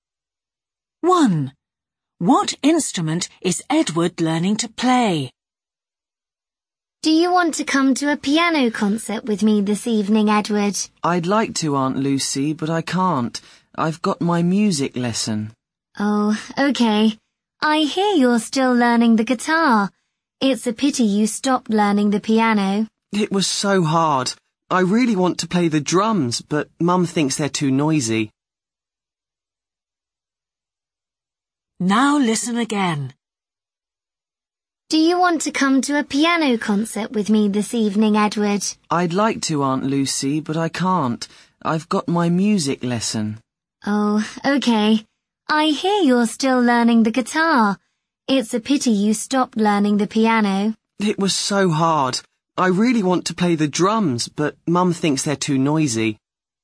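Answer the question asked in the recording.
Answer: the guitar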